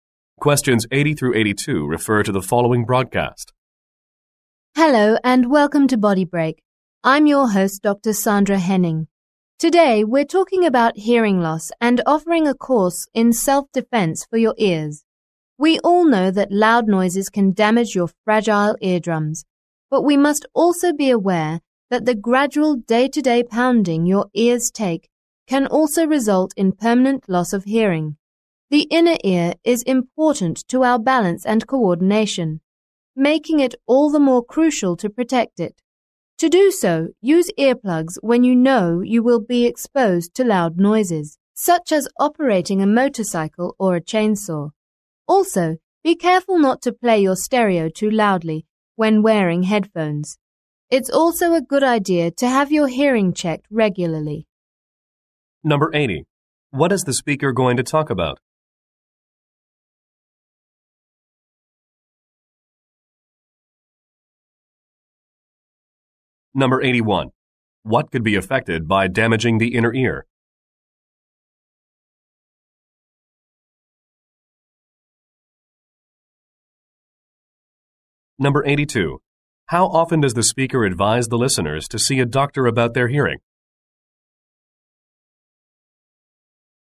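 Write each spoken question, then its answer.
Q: What is the speaker going to talk about?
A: Hearing loss and protecting the ears

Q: What could be affected by damaging the inner ear?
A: Balance and coordination

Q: How often does the speaker advise the listeners to see a doctor about their hearing?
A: Regularly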